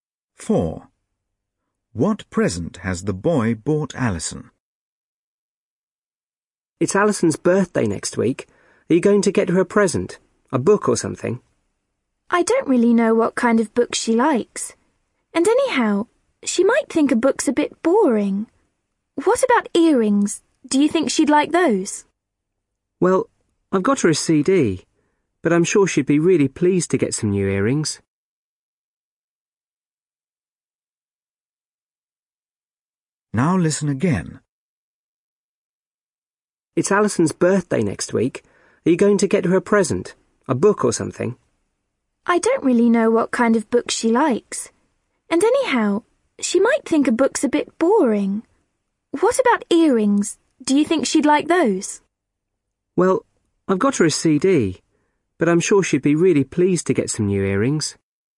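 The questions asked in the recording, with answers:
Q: What present has the boy bought Alison?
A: A CD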